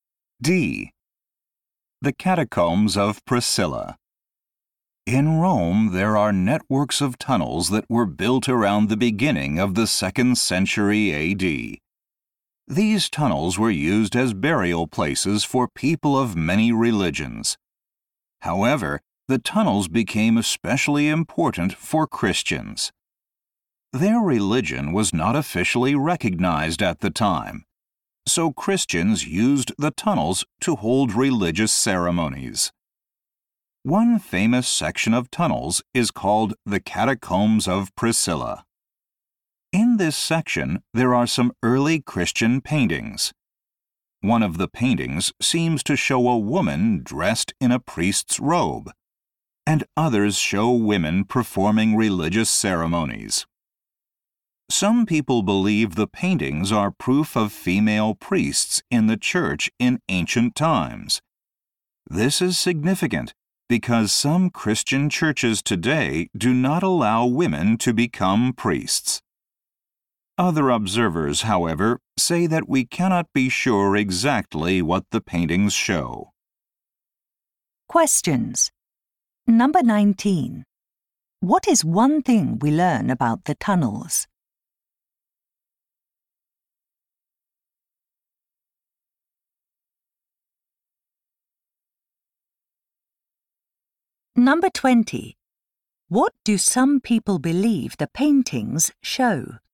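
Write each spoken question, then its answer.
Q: What is one thing we learn about the tunnels?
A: Christians used them to hold religious ceremonies.

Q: What do some people believe the paintings show?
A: That there were female priests in the church in ancient times.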